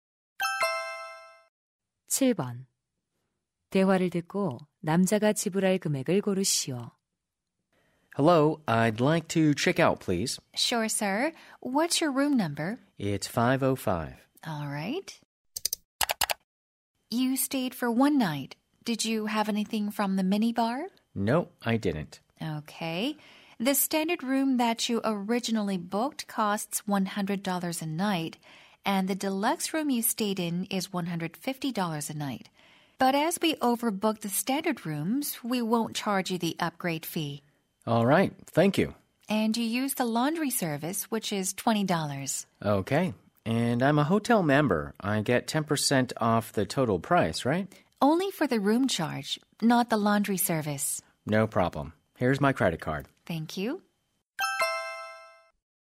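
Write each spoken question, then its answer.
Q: 대화를 듣고 남자가 지불할 금액을 고르시오.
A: 110달러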